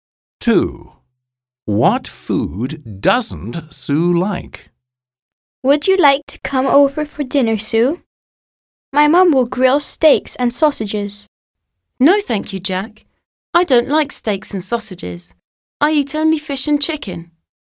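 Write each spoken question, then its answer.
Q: What food doesn't Sue like?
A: steaks and sausages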